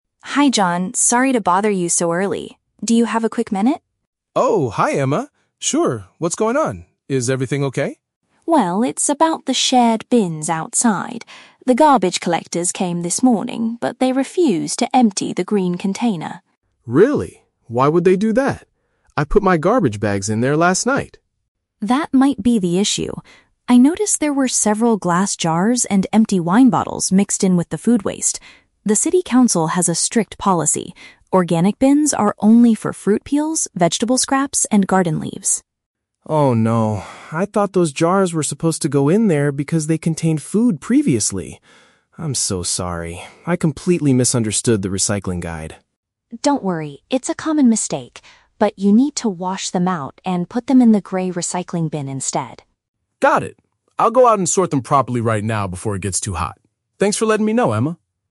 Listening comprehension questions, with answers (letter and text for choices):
Listen to the conversation between two neighbors, then choose the correct answer (A, B, or C) for each question.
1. Why did Emma knock on John's door?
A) To ask him to help her carry some heavy bags.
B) To inform him that the waste workers rejected their rubbish.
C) To complain about the loud noise he made last night.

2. What was the specific mistake John made?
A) He combined glass items with compostable materials.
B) He forgot to take his garbage out the night before.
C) He threw fruit peels and leaves into the grey recycling bin.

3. What does John plan to do immediately?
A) Call the city council to apologize for his error.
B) Read the new recycling guide from the supermarket.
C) Fix the problem by separating the trash correctly.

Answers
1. B) To inform him that the waste workers rejected their rubbish.
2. A) He combined glass items with compostable materials.
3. C) Fix the problem by separating the trash correctly.

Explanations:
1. Emma says that the "garbage collectors came this morning, but they refused to empty the green container." Option (B) uses paraphrasing ("waste workers" for "garbage collectors", "rejected" for "refused to empty"). Option (A) is a plausible neighborly request but is never mentioned. Option (C) is a trap; the phrase "last night" is mentioned by John about putting his bags out, not about making noise.
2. Emma points out that there were "glass jars and empty wine bottles mixed in with the food waste." Option (A) is a paraphrase ("combined" for "mixed in", "compostable materials" for "food waste"). Option (B) is a trap; John explicitly says he "put my garbage bags in there last night," so he didn't forget. Option (C) is a trap using words from the audio; "fruit peels and leaves" belong in the green bin, and the "grey recycling bin" is for the glass, but the option mixes up this logic.
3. John says, "I'll go out and sort them properly right now." "Sort them properly" is paraphrased as "separating the trash correctly." Option (A) is a trap; the "city council" is mentioned by Emma as having a strict policy, but John isn't going to call them. Option (B) is a trap; John mentions he "misunderstood the recycling guide," but he is not going to read a new one from the supermarket.

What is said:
Emma: Hi John, sorry to bother you so early. Do you have a quick minute?
John: Oh, hi Emma. Sure, what's going on? Is everything okay?
Emma: Well, it's about the shared bins outside. The garbage collectors came this morning, but they refused to empty the green container.
John: Really? Why would they do that? I put my garbage bags in there last night.
Emma: That might be the issue. I noticed there were several glass jars and empty wine bottles mixed in with the food waste. The city council has a strict policy: organic bins are only for fruit peels, vegetable scraps, and garden leaves.
John: Oh no... I thought those jars were supposed to go in there because they contained food previously. I'm so sorry, I completely misunderstood the recycling guide.
Emma: Don't worry, it's a common mistake. But you need to wash them out and put them in the grey recycling bin instead.
John: Got it. I'll go out and sort them properly right now before it gets too hot. Thanks for letting me know, Emma.